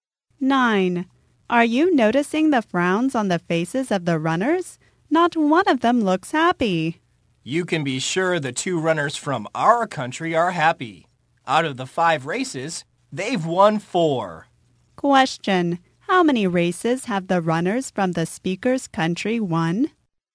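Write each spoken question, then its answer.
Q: How many races have the runners from the speaker's country won?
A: Four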